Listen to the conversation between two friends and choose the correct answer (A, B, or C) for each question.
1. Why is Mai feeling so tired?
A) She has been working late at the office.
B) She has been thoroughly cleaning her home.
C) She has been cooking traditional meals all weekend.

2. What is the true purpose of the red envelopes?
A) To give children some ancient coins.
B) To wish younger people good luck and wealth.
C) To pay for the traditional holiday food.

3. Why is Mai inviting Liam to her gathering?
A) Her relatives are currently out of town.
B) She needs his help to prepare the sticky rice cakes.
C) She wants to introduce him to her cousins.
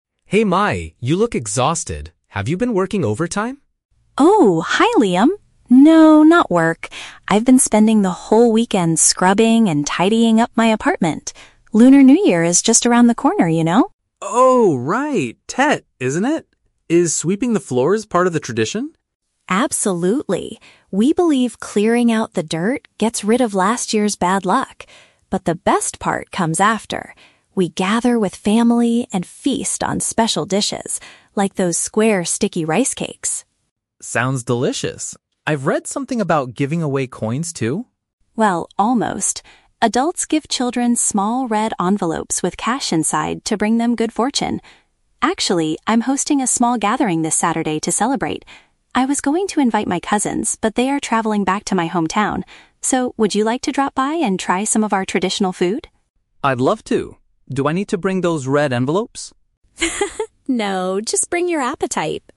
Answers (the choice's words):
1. She has been thoroughly cleaning her home.
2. To wish younger people good luck and wealth.
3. Her relatives are currently out of town.

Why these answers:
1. Mai says she was "scrubbing and tidying up my apartment" which means thoroughly cleaning her home. Option A is a trap because Liam asks if she was working overtime, but she says "No, not work". Option C is incorrect because she hasn't cooked the meals yet.
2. Mai explains that the envelopes contain cash "to bring them good fortune" (good luck and wealth). Option A is a trap; Liam asks about "coins", but Mai corrects him and says it is "cash". Option C is never mentioned in the conversation.
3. Mai says she originally wanted to invite her cousins, but they are "travelling back to my hometown" (out of town), so she invites Liam instead. Option C is a trap because her cousins won't be there. Option B is plausible but not mentioned in the audio.

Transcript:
Liam: Hey Mai, you look exhausted. Have you been working overtime?
Mai: Oh, hi Liam. No, not work. I've been spending the whole weekend scrubbing and tidying up my apartment. Lunar New Year is just around the corner, you know!
Liam: Oh, right! Tet, isn't it? Is sweeping the floors part of the tradition?
Mai: Absolutely. We believe clearing out the dirt gets rid of last year's bad luck. But the best part comes after. We gather with family and feast on special dishes, like those square sticky rice cakes.
Liam: Sounds delicious. I've read something about giving away coins too?
Mai: Well, almost. Adults give children small red envelopes with cash inside to bring them good fortune. Actually, I'm hosting a small gathering this Saturday to celebrate. I was going to invite my cousins, but they are travelling back to my hometown. So, would you like to drop by and try some of our traditional food?
Liam: I'd love to! Do I need to bring those red envelopes?